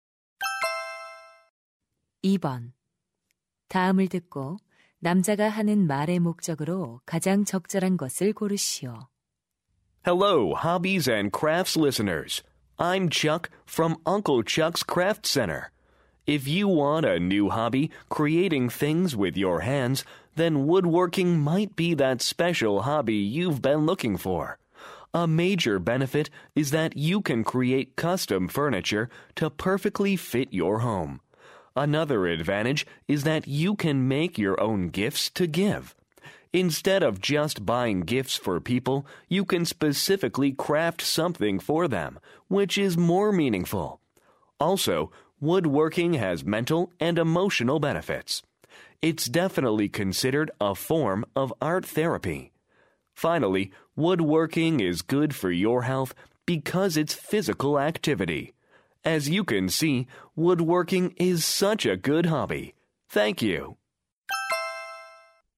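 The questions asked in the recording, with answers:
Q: 다음을 듣고 남자가 하는 말의 목적으로 가장 적절한 것을 고르시오.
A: 취미로 목공을 권장하려고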